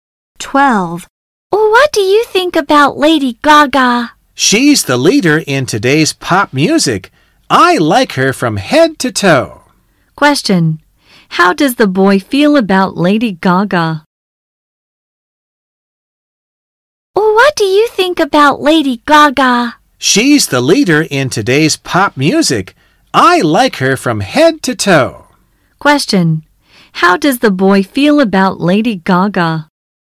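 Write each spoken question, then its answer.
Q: How does the boy feel about Lady Gaga?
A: He likes her very much.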